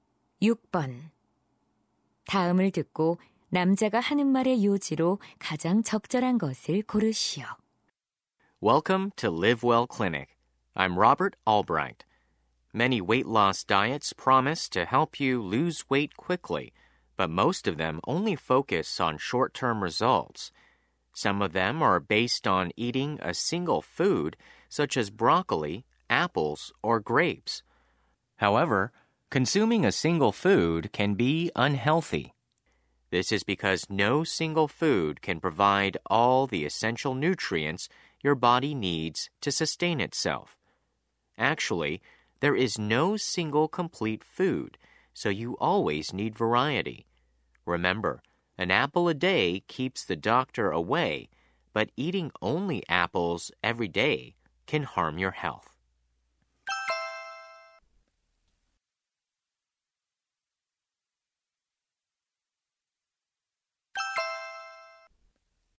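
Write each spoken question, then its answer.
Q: 다음을 듣고 남자가 하는 말의 요지로 가장 적절한 것을 고르시오.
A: 한 가지 음식만 먹는 다이어트는 건강에 해로우므로 다양하게 먹어야 한다.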